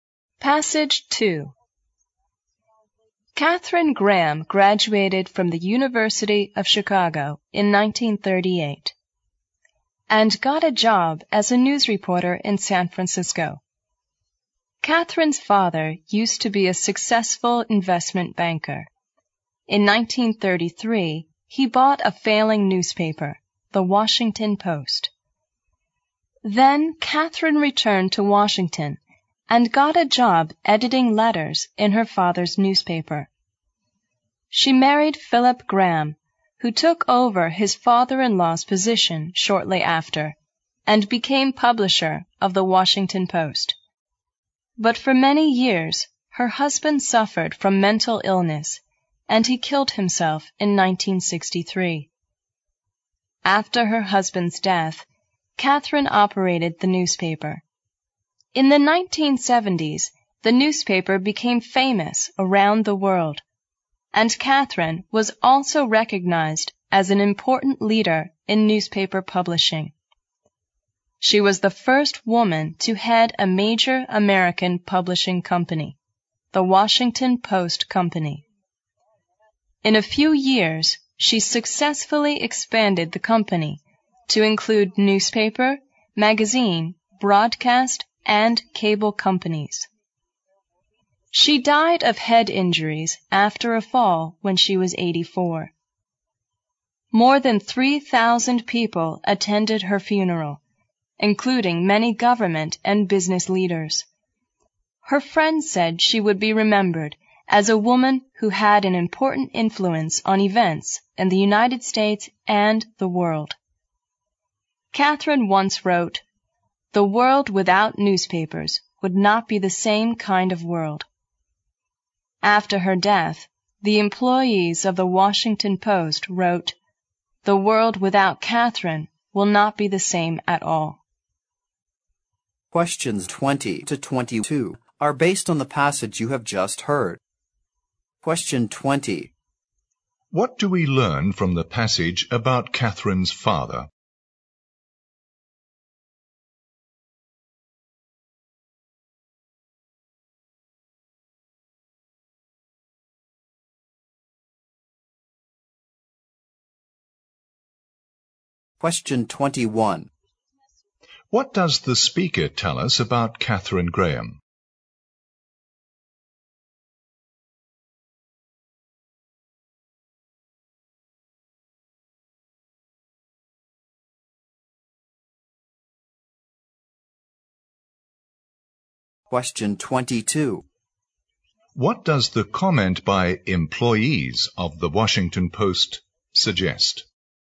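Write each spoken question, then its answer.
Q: What do we learn from the passage about Catherine's father?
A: He was a successful investment banker who bought The Washington Post in 1933.

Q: What does the speaker tell us about Catherine Graham?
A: She was the first woman to head a major American publishing company.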